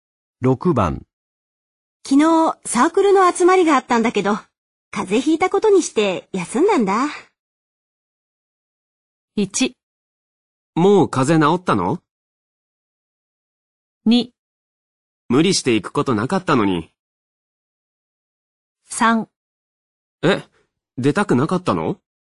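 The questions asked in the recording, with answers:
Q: 昨日、サークルの集まりがあったんだけど、風邪ひいたことにして休んだんだ。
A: 3: え、出たくなかったの?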